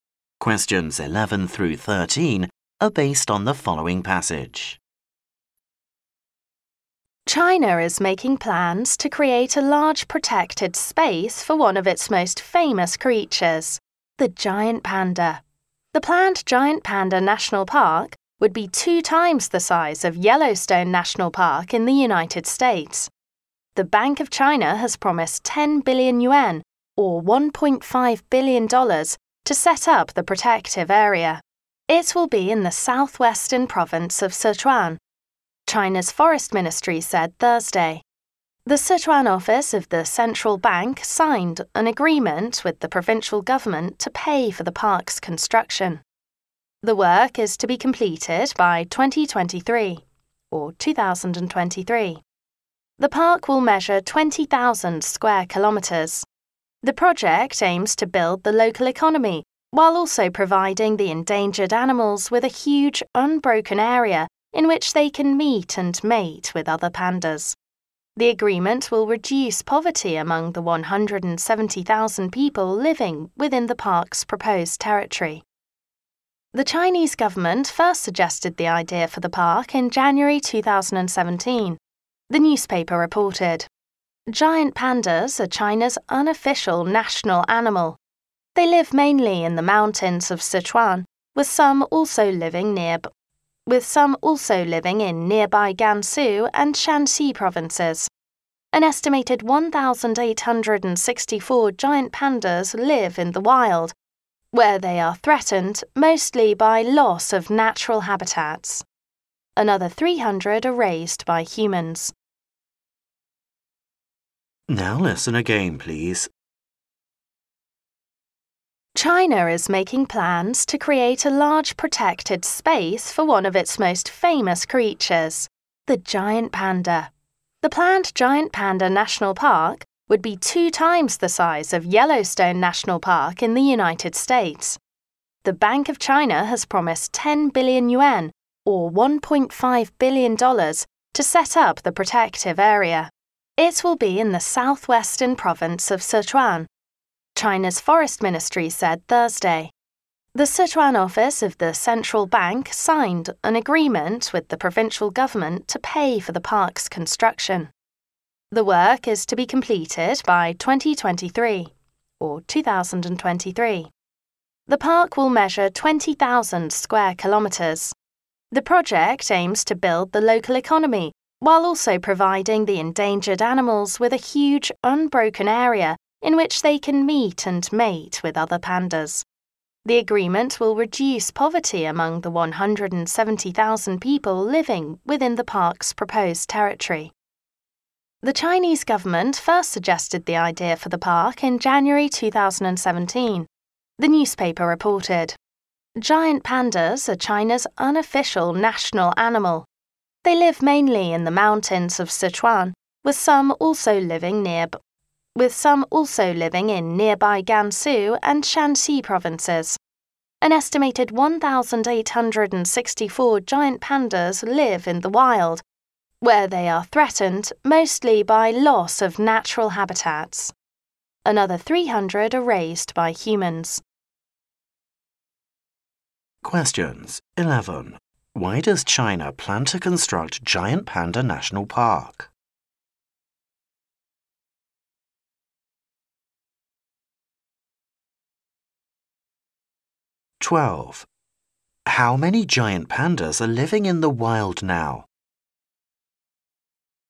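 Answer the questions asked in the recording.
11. To give pandas a large unbroken habitat and build the local economy
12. About 1,864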